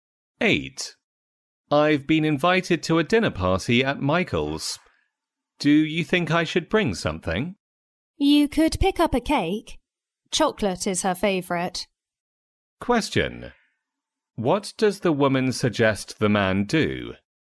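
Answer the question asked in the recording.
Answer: Bring a chocolate cake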